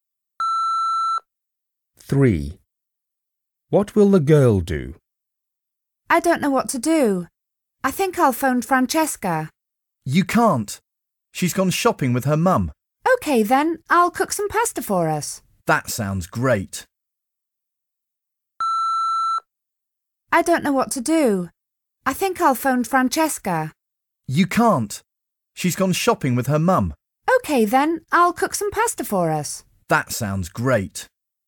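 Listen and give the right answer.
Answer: cook some pasta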